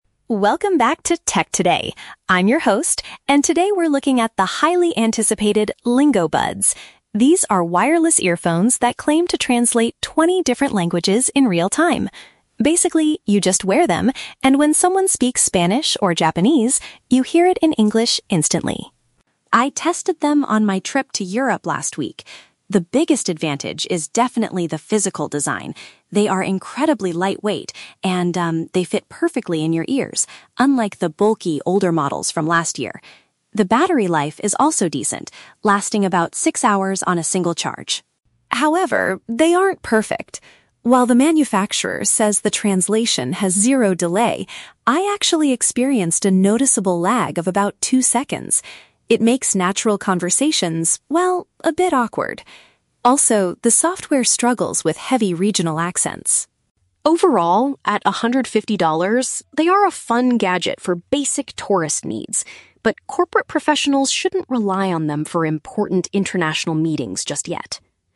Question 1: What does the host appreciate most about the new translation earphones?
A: Their physical shape and comfort.

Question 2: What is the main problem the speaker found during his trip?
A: There is a short pause before hearing the words.

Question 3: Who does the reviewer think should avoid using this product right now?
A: Businesspeople attending global conferences.

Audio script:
Tech Reviewer: Welcome back to 'Tech Today'! I'm your host, and today we're looking at the highly anticipated 'Lingo-Buds'. These are wireless earphones that claim to translate 20 different languages in real-time. Basically, you just wear them, and when someone speaks Spanish or Japanese, you hear it in English instantly.
I tested them on my trip to Europe last week. The biggest advantage is definitely the physical design. They are incredibly lightweight, and, um, they fit perfectly in your ears, unlike the bulky older models from last year. The battery life is also decent, lasting about six hours on a single charge.
However, they aren't perfect. While the manufacturer says the translation has zero delay, I actually experienced a noticeable lag of about two seconds. It makes natural conversations, well, a bit awkward. Also, the software struggles with heavy regional accents.
Overall, at $150, they are a fun gadget for basic tourist needs, but corporate professionals shouldn't rely on them for important international meetings just yet.